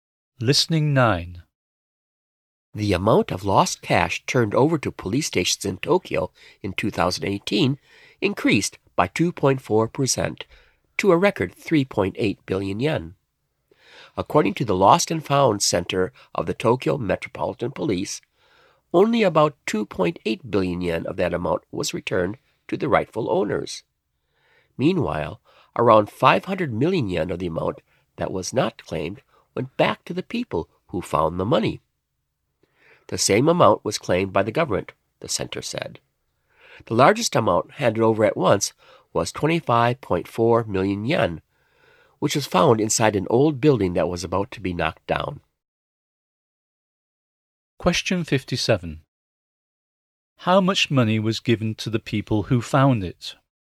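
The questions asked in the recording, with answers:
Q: How much money was given to the people who found it?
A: About 500 million yen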